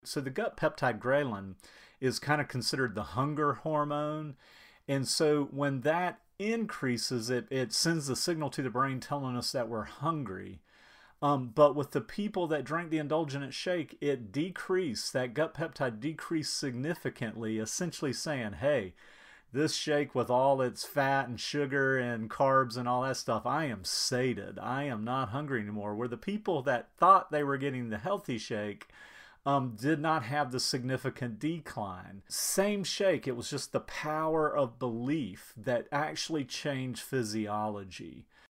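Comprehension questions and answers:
Listen and Answer the questions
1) What is the gut peptide ghrelin?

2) What happens to the brain when the gut peptide ghrelin increases?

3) What happened to the people who drank the indulgent milkshake?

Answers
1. The hunger hormone
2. It gets a signal that we're hungry
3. Their ghrelin (hunger hormone) decreased significantly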